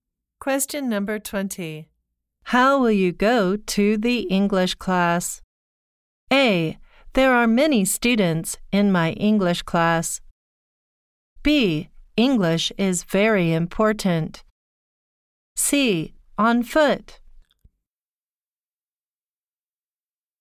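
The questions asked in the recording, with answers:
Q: How will you go to the English class?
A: C: On foot.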